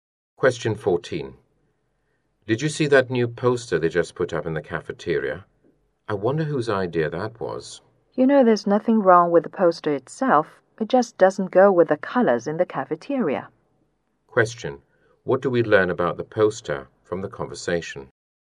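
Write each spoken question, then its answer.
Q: What do we learn about the poster from the conversation?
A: Its colours don't match the cafeteria's colours.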